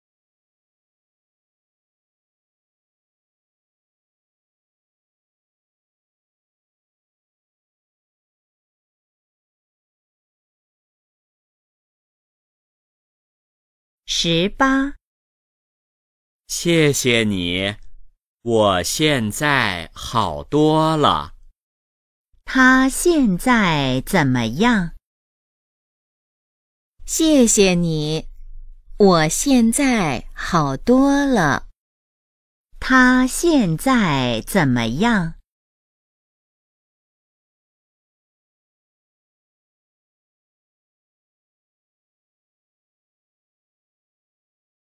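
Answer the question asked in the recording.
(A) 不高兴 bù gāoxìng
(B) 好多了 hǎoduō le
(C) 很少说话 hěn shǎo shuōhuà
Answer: (B) 好多了 hǎoduō le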